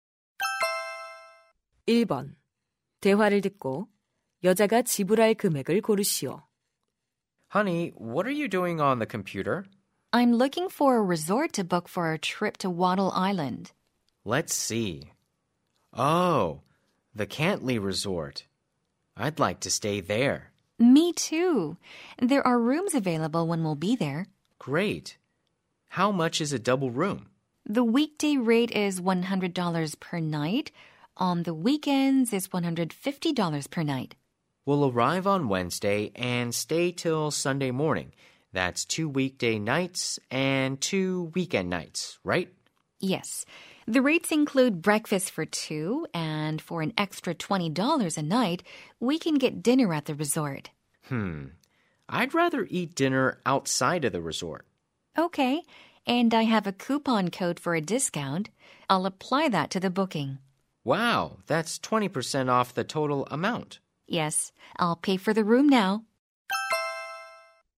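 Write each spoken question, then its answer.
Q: 대화를 듣고 여자가 지불할 금액을 고르시오.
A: $400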